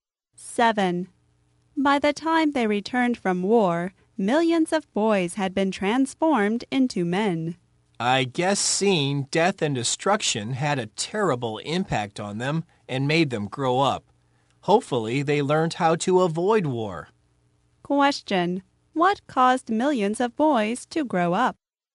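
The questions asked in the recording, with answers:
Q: What caused millions of boys to grow up?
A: Seeing death and destruction in the war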